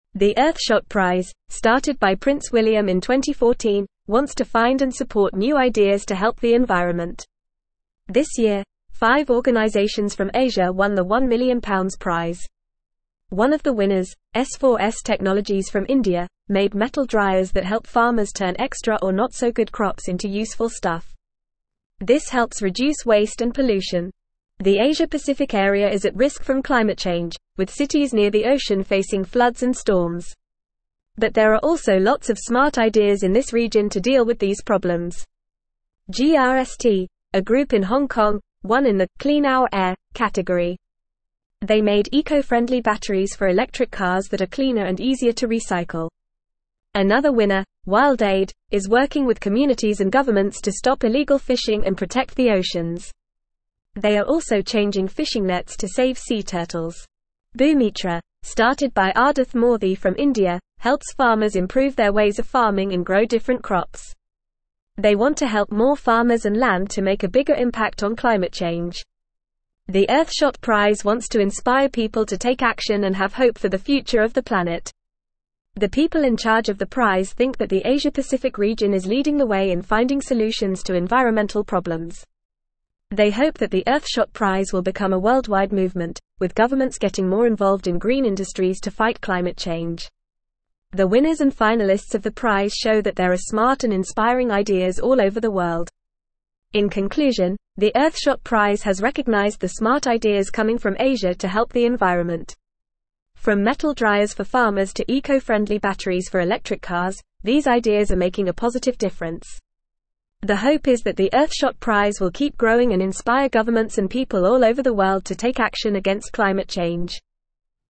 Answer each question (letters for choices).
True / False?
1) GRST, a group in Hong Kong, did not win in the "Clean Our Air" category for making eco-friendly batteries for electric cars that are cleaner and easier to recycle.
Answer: False

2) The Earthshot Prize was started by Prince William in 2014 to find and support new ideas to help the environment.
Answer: True

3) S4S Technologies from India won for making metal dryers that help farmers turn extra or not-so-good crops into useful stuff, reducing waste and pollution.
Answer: True

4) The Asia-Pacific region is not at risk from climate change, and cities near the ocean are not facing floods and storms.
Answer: False

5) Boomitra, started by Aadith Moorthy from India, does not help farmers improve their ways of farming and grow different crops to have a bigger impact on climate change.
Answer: False

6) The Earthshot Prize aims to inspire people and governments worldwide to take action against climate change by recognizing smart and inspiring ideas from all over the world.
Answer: True

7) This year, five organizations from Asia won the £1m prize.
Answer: True

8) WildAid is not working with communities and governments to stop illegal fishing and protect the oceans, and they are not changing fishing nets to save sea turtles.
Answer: False

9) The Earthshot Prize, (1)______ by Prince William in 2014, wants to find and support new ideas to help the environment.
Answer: started

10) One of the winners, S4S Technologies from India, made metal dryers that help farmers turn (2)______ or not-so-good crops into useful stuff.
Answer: extra

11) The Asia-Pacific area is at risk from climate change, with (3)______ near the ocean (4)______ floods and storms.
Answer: cities

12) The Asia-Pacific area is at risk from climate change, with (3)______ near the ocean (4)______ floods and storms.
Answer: facing

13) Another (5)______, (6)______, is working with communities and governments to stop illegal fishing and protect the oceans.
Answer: winner

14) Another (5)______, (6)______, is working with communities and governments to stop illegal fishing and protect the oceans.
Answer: WildAid

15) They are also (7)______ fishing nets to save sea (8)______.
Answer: changing

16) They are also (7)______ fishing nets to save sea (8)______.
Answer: turtles

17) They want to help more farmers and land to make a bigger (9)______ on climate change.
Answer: impact

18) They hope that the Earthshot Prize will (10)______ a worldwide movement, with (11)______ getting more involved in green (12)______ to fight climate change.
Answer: become

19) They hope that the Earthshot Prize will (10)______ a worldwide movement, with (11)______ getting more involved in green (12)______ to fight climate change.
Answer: governments

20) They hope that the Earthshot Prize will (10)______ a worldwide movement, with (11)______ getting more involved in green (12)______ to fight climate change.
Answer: industries

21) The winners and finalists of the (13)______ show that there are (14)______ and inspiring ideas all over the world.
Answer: prize

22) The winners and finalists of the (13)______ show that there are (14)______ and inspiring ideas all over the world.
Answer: smart

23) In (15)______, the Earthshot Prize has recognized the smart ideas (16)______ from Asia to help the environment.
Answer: conclusion

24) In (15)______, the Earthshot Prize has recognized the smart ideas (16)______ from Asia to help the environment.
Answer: coming

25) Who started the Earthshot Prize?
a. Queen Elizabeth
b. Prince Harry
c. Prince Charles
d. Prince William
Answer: d

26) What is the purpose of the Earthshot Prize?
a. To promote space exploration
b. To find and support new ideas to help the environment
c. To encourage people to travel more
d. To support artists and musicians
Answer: b

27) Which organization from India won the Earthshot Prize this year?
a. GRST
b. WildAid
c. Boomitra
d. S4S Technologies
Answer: d

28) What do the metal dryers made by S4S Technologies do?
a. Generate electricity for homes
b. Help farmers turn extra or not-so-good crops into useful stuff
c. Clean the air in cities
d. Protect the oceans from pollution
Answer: b

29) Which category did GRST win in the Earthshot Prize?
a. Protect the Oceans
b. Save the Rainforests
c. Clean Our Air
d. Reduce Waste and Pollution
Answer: c

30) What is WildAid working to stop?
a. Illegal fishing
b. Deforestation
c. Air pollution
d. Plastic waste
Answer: a

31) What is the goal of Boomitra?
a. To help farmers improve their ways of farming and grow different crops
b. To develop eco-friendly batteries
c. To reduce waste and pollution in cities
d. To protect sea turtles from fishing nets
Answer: a

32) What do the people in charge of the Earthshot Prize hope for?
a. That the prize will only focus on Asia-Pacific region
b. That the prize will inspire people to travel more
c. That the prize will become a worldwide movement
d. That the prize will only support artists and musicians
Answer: c

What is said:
The Earthshot Prize, started by Prince William in 2014, wants to find and support new ideas to help the environment. One of the winners, S4S Technologies from India, made metal dryers that help farmers turn extra or not-so-good crops into useful stuff. This helps reduce waste and pollution. The Asia-Pacific area is at risk from climate change, with cities near the ocean facing floods and storms. But there are also lots of smart ideas in this region to deal with these problems.
GRST, a group in Hong Kong, won in the "Clean Our Air" category. They made eco-friendly batteries for electric cars that are cleaner and easier to recycle. Another winner, WildAid, is working with communities and governments to stop illegal fishing and protect the oceans. They are also changing fishing nets to save sea turtles. Boomitra, started by Aadith Moorthy from India, helps farmers improve their ways of farming and grow different crops. They want to help more farmers and land to make a bigger impact on climate change.
The Earthshot Prize wants to inspire people to take action and have hope for the future of the planet. The people in charge of the prize think that the Asia-Pacific region is leading the way in finding solutions to environmental problems. They hope that the Earthshot Prize will become a worldwide movement, with governments getting more involved in green industries to fight climate change. The winners and finalists of the prize show that there are smart and inspiring ideas all over the world.
In conclusion, the Earthshot Prize has recognized the smart ideas coming from Asia to help the environment. From metal dryers for farmers to eco-friendly batteries for electric cars, these ideas are making a positive difference. The hope is that the Earthshot Prize will keep growing and inspire governments and people all over the world to take action against climate change.

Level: Level 3